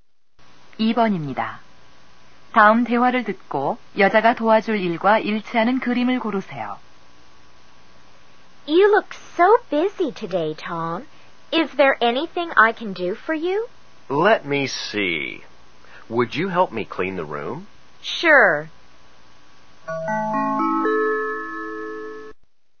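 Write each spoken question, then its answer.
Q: 다음 대화를 듣고 여자가 도와줄 일과 일치하는 그림을 고르세요.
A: 방 청소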